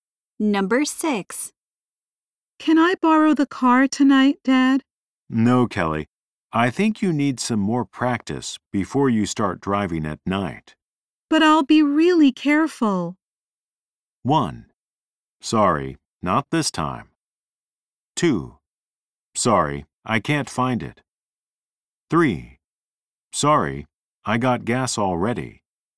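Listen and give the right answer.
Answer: 1: Sorry, not this time.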